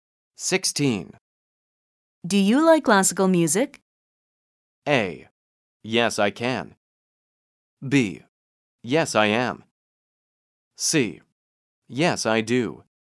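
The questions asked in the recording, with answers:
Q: Do you like classical music?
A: C: Yes, I do.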